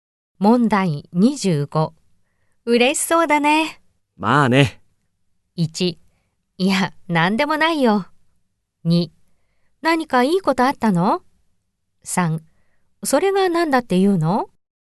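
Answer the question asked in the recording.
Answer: 2: 何かいいことあったの?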